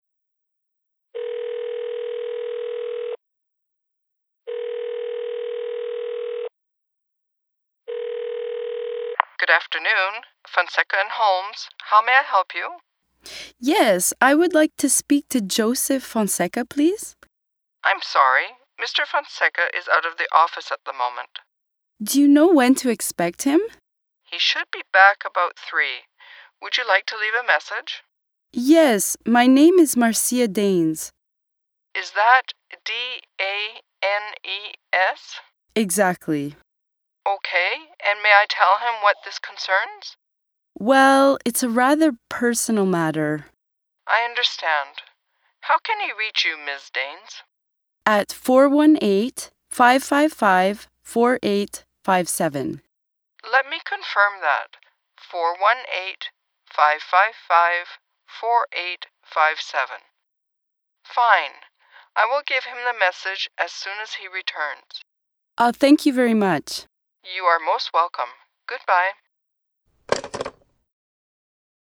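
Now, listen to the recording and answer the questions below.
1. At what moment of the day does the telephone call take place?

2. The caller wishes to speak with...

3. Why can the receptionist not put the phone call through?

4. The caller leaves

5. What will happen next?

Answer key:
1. afternoon
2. Joseph Fonseca
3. Mr. Fonseca is out of the office at the moment.
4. her name (Marcia Danes) and phone number (418-555-4857)
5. The receptionist will give Mr. Fonseca the message when he returns, about 3.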